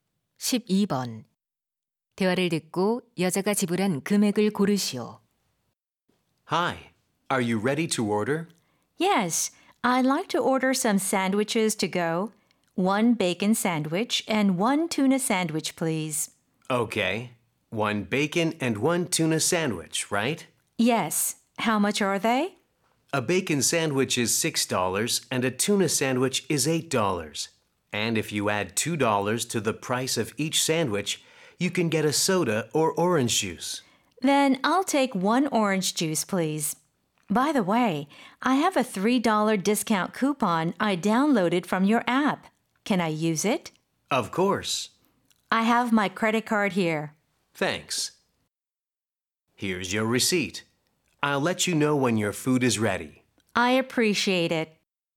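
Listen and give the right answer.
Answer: 13달러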